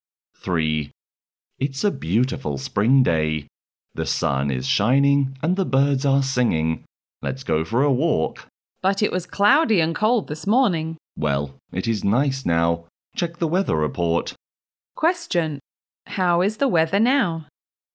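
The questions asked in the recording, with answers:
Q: How is the weather now?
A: Sunny and nice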